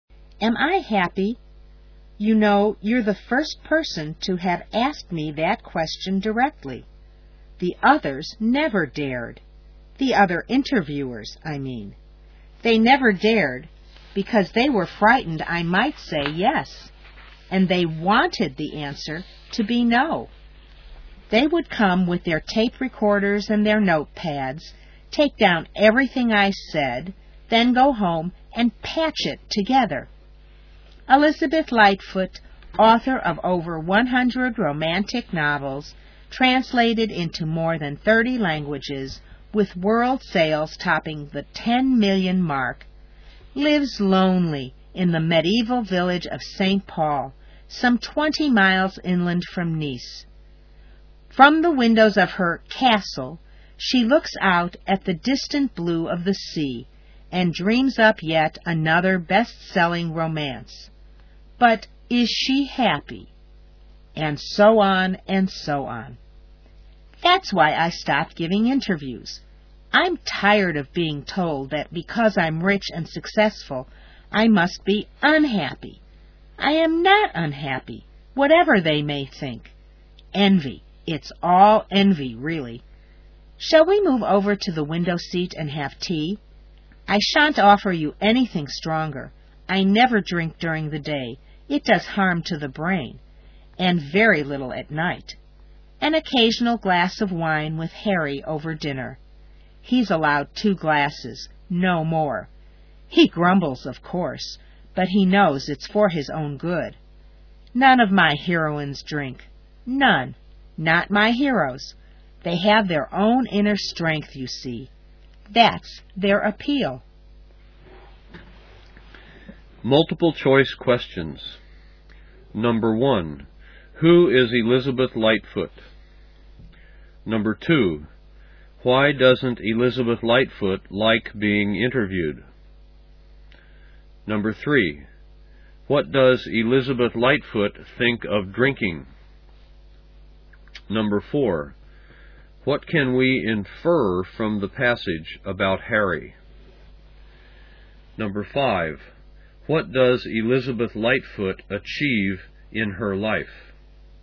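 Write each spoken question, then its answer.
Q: Who is Elizabeth Lightfoot?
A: An author of over 100 romantic novels

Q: Why doesn't Elizabeth Lightfoot like being interviewed?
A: Interviewers assume she must be unhappy because she is rich and successful

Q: What does Elizabeth Lightfoot think of drinking?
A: It harms the brain; she never drinks during the day and very little at night

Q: What does Elizabeth Lightfoot achieve in her life?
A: Great success: over 100 novels, translated into 30+ languages, over 10 million sales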